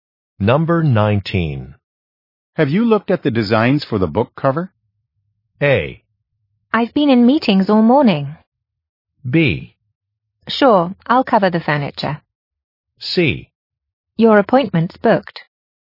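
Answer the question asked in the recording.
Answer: A: I've been in meetings all morning.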